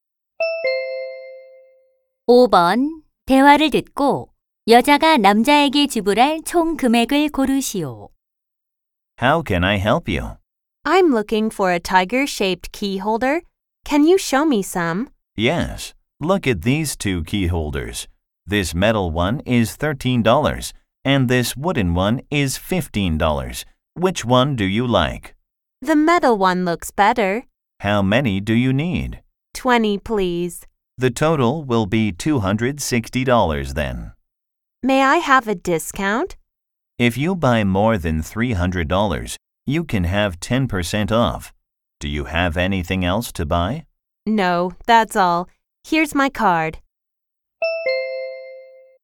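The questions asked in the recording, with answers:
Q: 대화를 듣고 여자가 남자에게 지불할 총 금액을 고르시오.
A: 260달러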